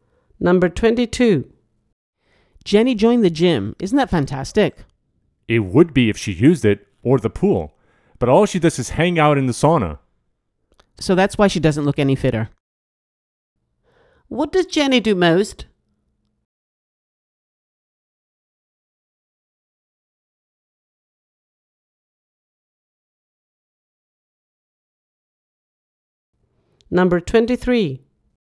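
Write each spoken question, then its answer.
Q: What does Jenny do most?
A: Sits in the sauna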